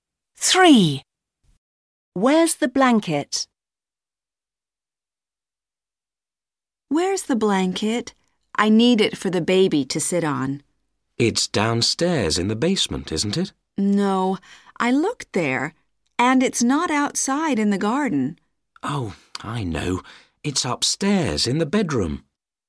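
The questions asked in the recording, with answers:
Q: Where's the blanket?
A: Upstairs in the bedroom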